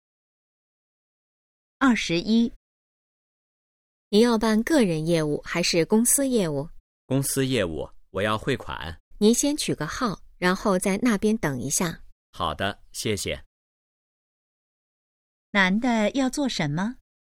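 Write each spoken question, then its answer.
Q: 男的要做什么?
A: 汇款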